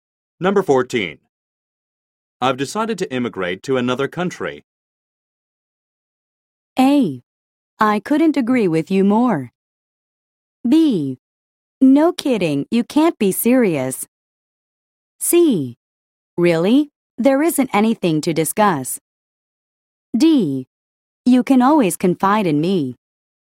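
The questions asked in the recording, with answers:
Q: I've decided to immigrate to another country.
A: B: No kidding, you can't be serious.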